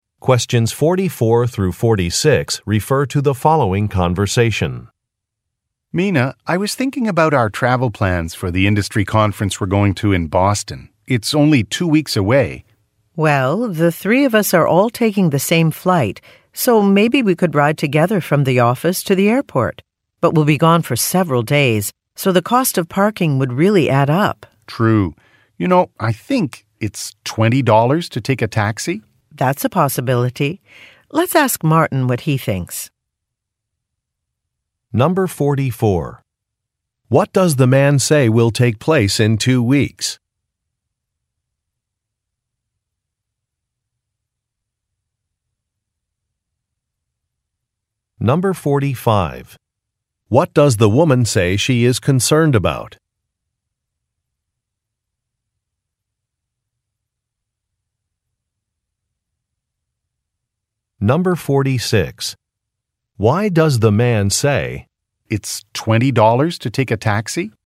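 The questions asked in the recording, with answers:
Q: What does the man say will take place in 2 weeks?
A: An industry conference in Boston

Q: What does the woman say she is concerned about?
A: The cost of parking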